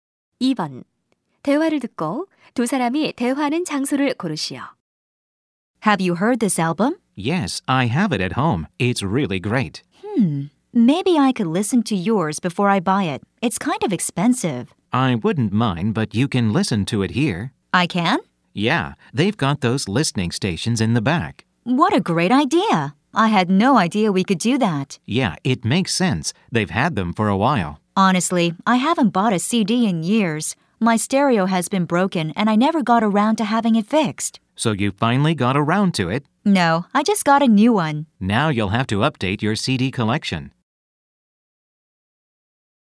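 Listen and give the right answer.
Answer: 음반 가게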